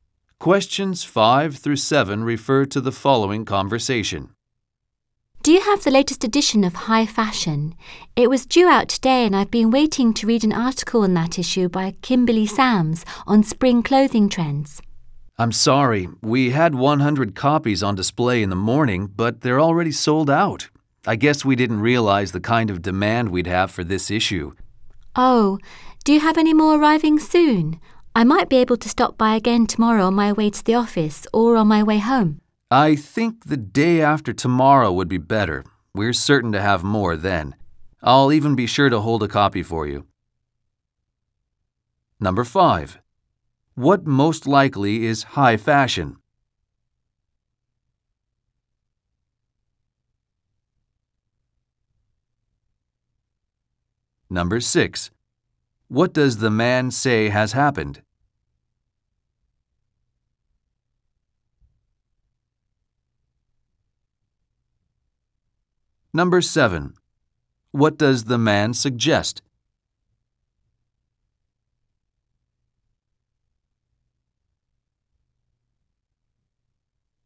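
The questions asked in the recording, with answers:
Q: What most likely is high fashion?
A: A magazine

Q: What does the man say has happened?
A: All the copies sold out

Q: What does the man suggest?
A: Coming back the day after tomorrow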